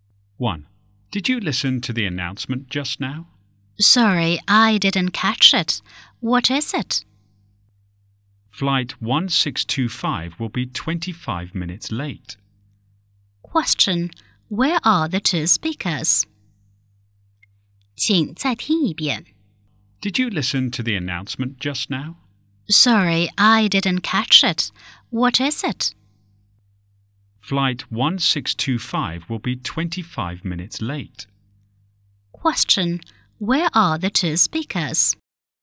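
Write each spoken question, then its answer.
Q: Question, where are the two speakers?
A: At an airport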